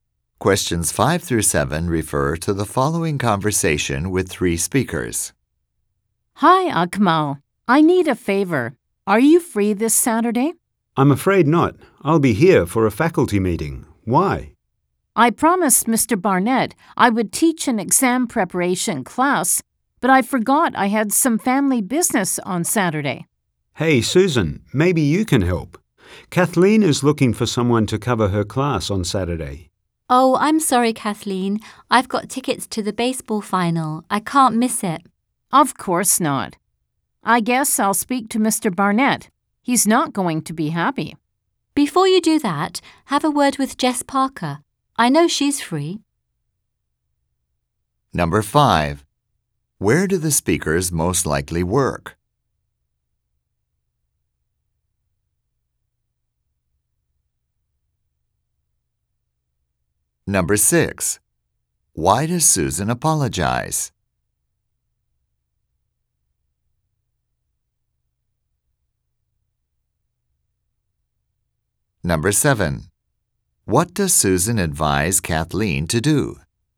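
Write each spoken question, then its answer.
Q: Where do the speakers most likely work?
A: At a school

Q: Why does Susan apologize?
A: She has tickets to the baseball final, so she can't cover the class

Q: What does Susan advise Kathleen to do?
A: Talk to Jess Parker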